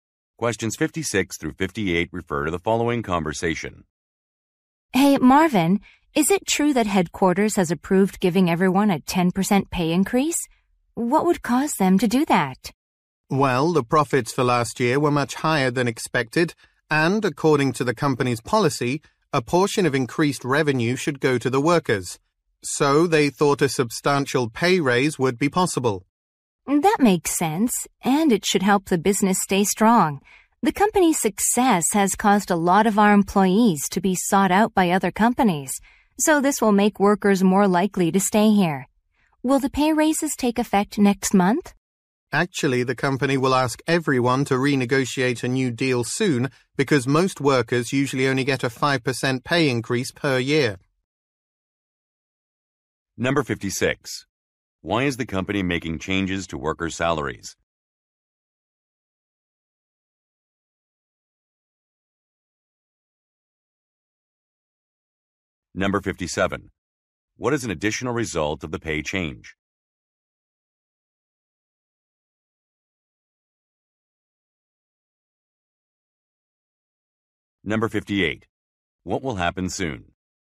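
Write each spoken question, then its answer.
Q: Why is the company making changes to workers' salaries?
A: Profits were higher than expected

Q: What is an additional result of the pay change?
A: Employees will be more likely to stay

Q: What will happen soon?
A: Workers will renegotiate their contracts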